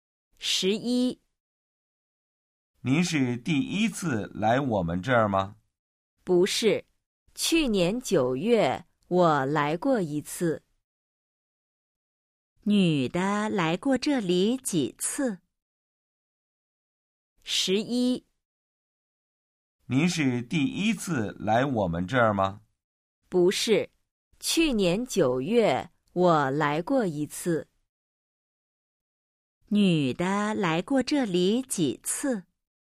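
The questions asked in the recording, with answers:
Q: 女的来过这里几次?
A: 一次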